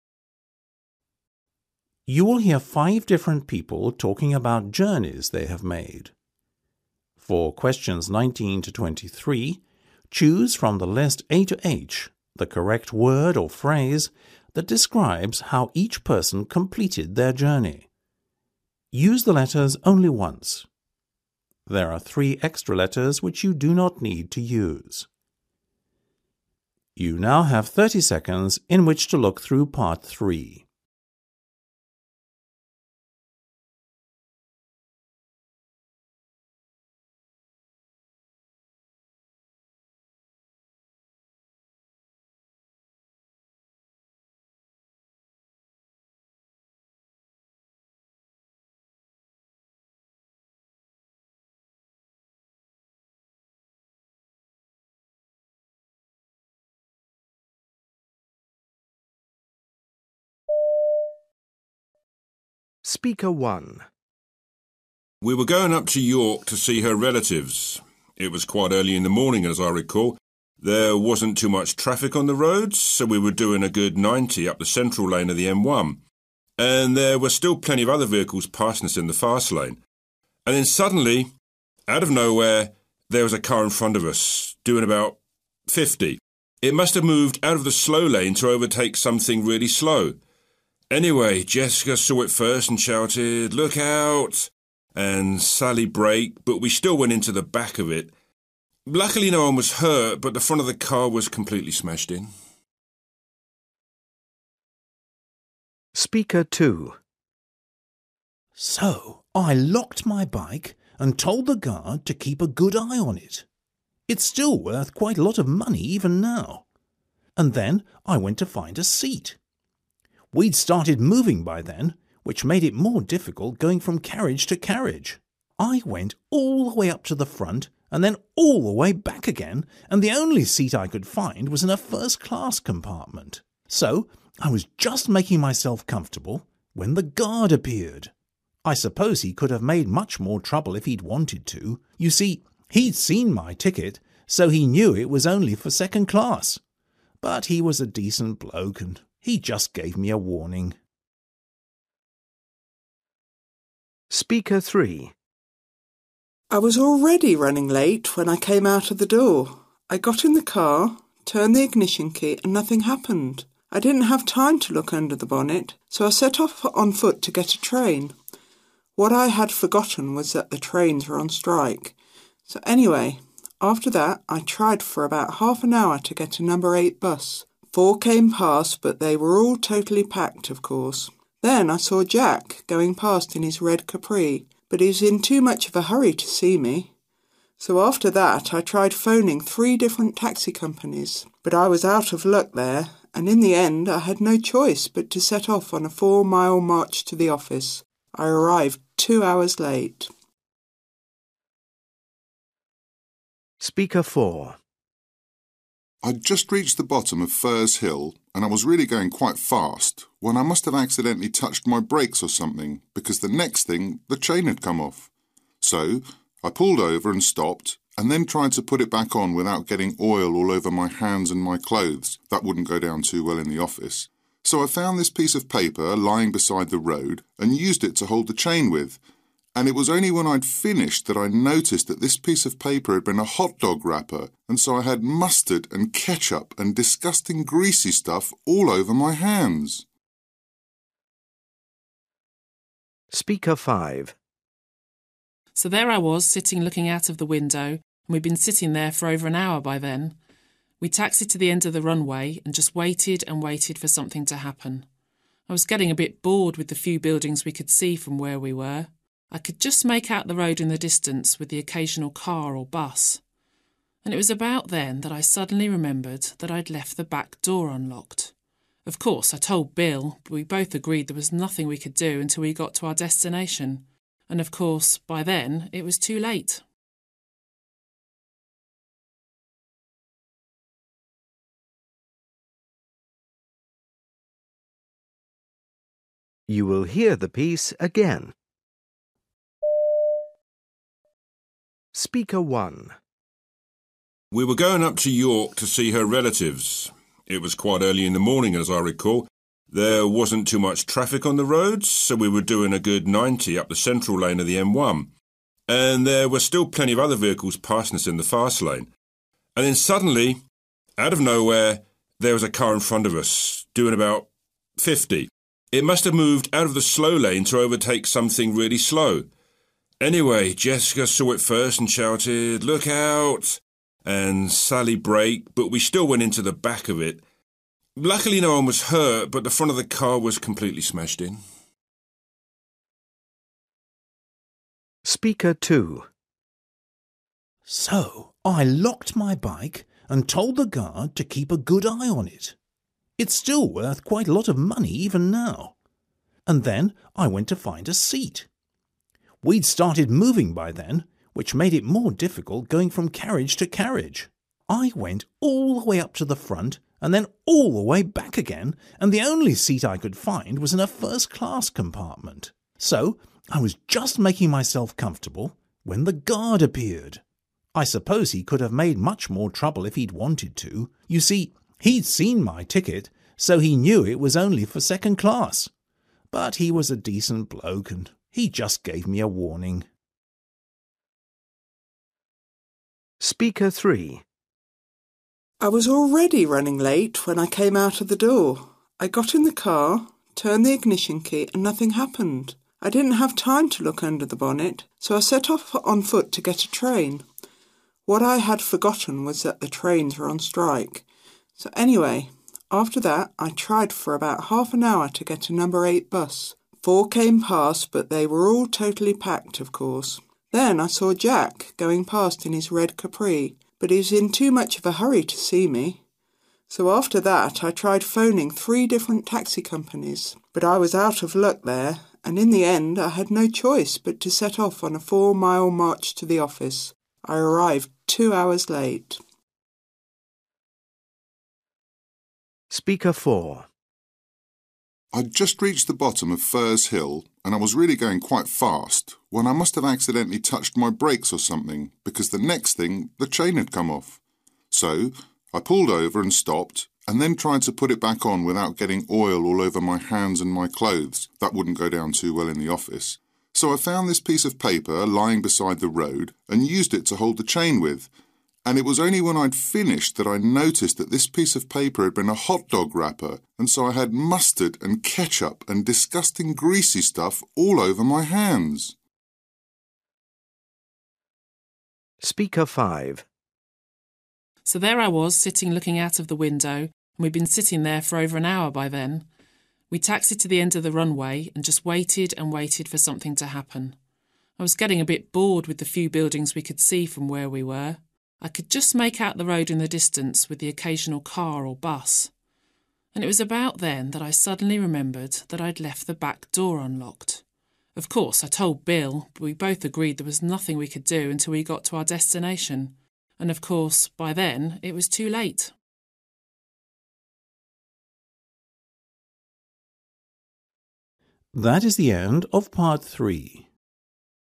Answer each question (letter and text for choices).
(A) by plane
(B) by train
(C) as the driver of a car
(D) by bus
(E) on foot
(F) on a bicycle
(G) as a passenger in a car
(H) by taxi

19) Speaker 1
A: (G) as a passenger in a car

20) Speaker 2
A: (B) by train

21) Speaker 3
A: (E) on foot

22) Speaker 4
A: (F) on a bicycle

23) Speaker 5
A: (A) by plane

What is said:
Listening Part 3
You will hear five different people talking about journeys they have made. For questions 19-23, choose from the list A-H the correct word or phrase that describes how each person completed their journey. Use the letters only once. There are three extra letters which you do not need to use.
A by plane
B by train
C as the driver of a car
D by bus
E on foot
G as a passenger in a car
H by taxi
19 Speaker 1
20 Speaker 2
21 Speaker 3
22 Speaker 4
23 Speaker 5
We were going up to York to see her relatives ... it was quite early in the morning, as I recall. There wasn't too much traffic on the roads so we were doing a good ninety up the central lane of the M1 – and there were still plenty of other vehicles passing us in the fast lane ... and then suddenly, out of nowhere, there was a car in front of us, doing about fifty – it must have moved out from the slow lane to overtake something really slow. Anyway, Jessica saw it first and shouted 'Look out' and Sally braked but we still went into the back of it. Luckily, nobody was hurt. But the front of the car was completely smashed in ...
so I locked my bike and told the guard to keep a good eye on it ... it's still worth quite a lot of money, even now ... and then I went to find a seat. We'd started moving by then, which made it more difficult going from carriage to carriage. I went all the way up to the front and then all the way back again and the only seat I could find was in a first class compartment. So, I was just making myself comfortable when the guard appeared. I suppose he could have made much more trouble if he'd wanted to. You see, he'd seen my ticket so he knew it was only for second class ... but he was a decent bloke and he just gave me a warning.
I was already running late when I came out of the door, I got in the car, turned the ignition key and nothing happened. I didn't have time to look under the bonnet, so I set off on foot to get a train. What I had forgotten was that the trains were on strike. So anyway, after that, I tried for about half an hour to get a number eight bus. Four came past but they were all totally packed, of course. Then I saw Jack going past in his red Capri ... but he was in too much of a hurry to see me. So, after that, I tried phoning three different taxi companies, but I was out of luck there – and in the end, I had no choice but to set off on a four-mile march to the office. I arrived two hours late.
I'd just reached the bottom of Furze Hill and I was really going quite fast when I must have accidentally touched my brakes or something because the next thing ... the chain had come off. So, I pulled over and stopped and then tried to put it back on without getting oil all over my hands and my clothes – that wouldn't go down too well in the office. So, I found this piece of paper, lying beside the road, and used it to hold the chain with and it was only when I'd finished that I noticed that this piece of paper had been a hot-dog wrapper and so I had mustard and ketchup and disgusting greasy stuff all over my hands.
So there I was sitting looking out of the window and we'd been sitting there for over an hour by then. We'd taxied to the end of the runway and just waited and waited for something to happen. I was getting a bit bored with the few buildings we could see from where we were. I could just make out the road in the distance, with the occasional car or bus. And, it was about then that I suddenly remembered that I'd left the back door unlocked. Of course, I told Bill but we both agreed there was nothing we could do until we got to our destination ... and, of course, by then, it was too late.